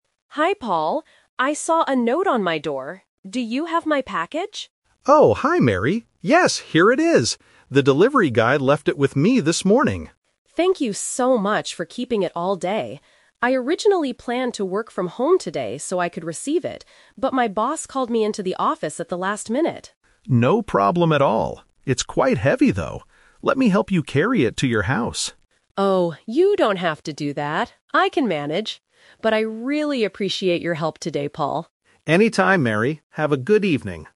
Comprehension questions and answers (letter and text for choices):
Listen to the conversation and choose the correct answer (A, B, or C).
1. Why does Paul have Mary's package?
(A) Because he bought it for her.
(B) Because the delivery guy left it with him.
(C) Because Mary asked him to go to the post office.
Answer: (B) Because the delivery guy left it with him.

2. Why wasn't Mary at home this morning?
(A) She had to go to the office.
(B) She was working from home.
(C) She went to the supermarket.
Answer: (A) She had to go to the office.

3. What does Paul offer to do for Mary?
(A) Open the package for her.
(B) Call the delivery guy.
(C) Carry the package to her house.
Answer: (C) Carry the package to her house.

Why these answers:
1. Paul says, "The delivery guy left it with me this morning." Trap: Option (A) and (C) are plausible situations involving a neighbor or a package, but they are not mentioned in the audio.
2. Mary explains, "but my boss called me into the office at the last minute." Trap: Option (B) is the classic "Twist/Expectation" trap. Working from home is what Mary originally planned to do, not what actually happened. Option (C) is a common reason to leave the house but is not mentioned.
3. Paul notices the package is heavy and says, "Let me help you carry it to your house." Trap: Option (A) uses the word "package," and Option (B) uses "delivery guy," both of which are words heard in the conversation, but Paul does not offer to do these actions.

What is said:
Mary: Hi, Paul. I saw a note on my door. Do you have my package?
Paul: Oh, hi Mary! Yes, here it is. The delivery guy left it with me this morning.
Mary: Thank you so much for keeping it all day. I originally planned to work from home today so I could receive it, but my boss called me into the office at the last minute.
Paul: No problem at all. It's quite heavy, though. Let me help you carry it to your house.
Mary: Oh, you don't have to do that. I can manage. But I really appreciate your help today, Paul.